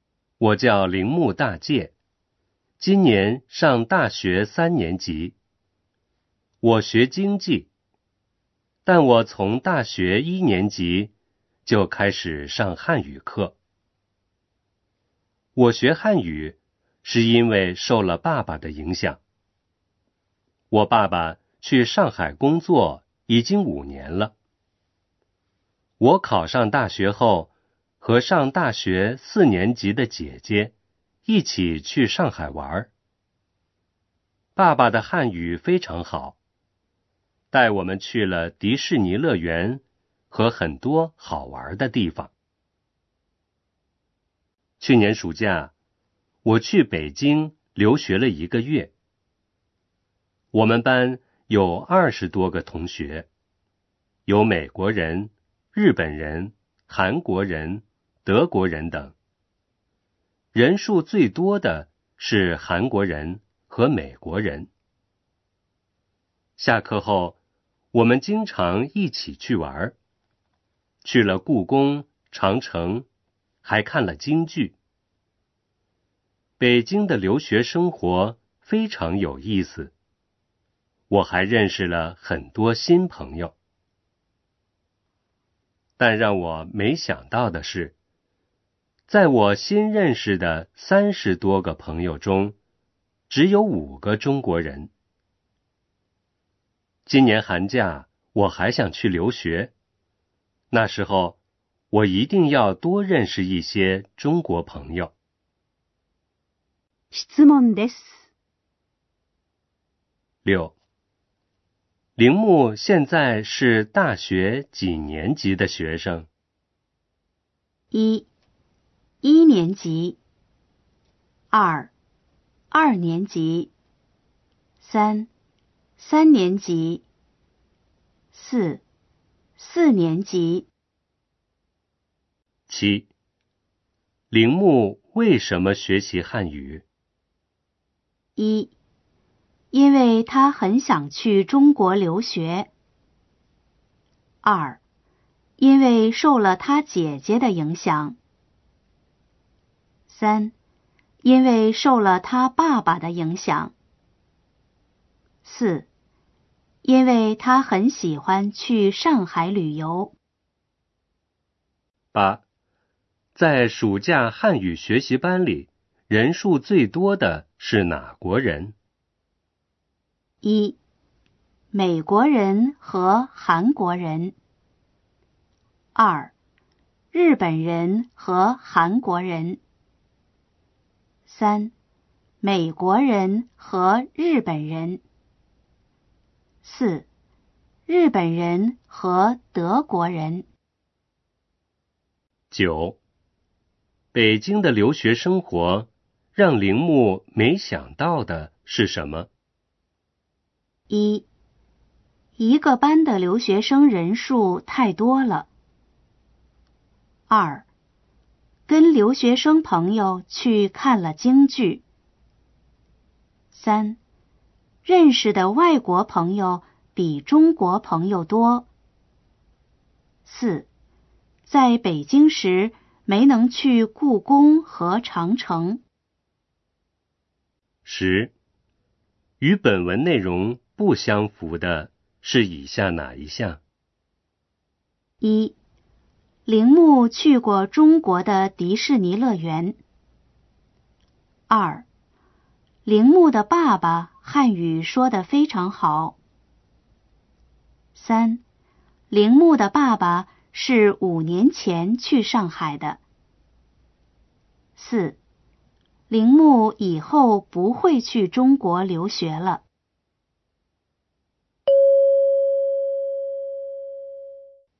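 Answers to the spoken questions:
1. 三: 三年级。
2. 三: 因为受了他爸爸的影响。
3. 一: 美国人和韩国人。
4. 三: 认识的外国朋友比中国朋友多。
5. 四: 铃木以后不会去中国留学了。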